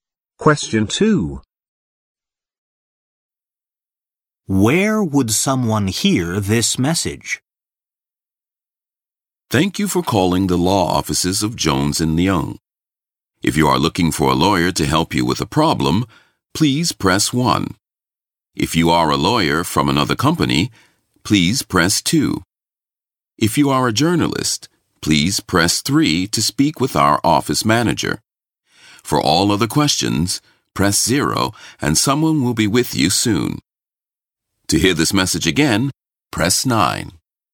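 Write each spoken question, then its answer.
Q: Where would someone hear this message?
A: On the phone when calling a law office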